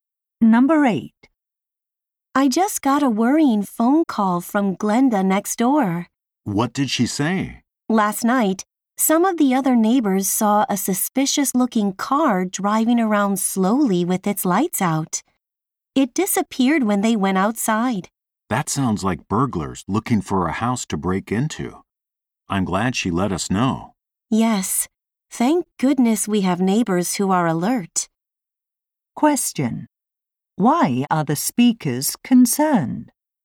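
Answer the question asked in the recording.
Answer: A suspicious car, possibly burglars, was seen in the neighborhood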